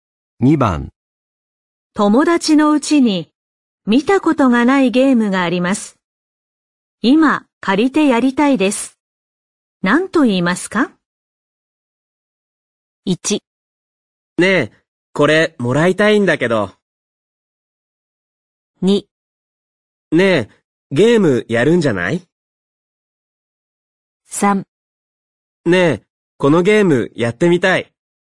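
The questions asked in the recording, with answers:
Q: 何と言いますか?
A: 3: ねえ、このゲームやってみたい。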